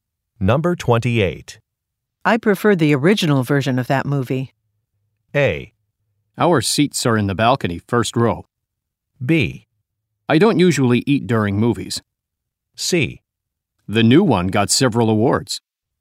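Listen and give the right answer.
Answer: C: The new one got several awards.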